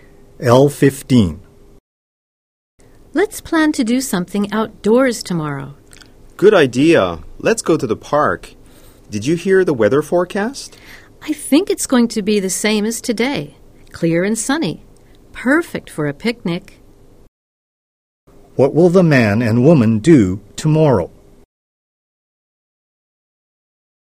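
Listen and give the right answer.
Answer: Have a picnic in the park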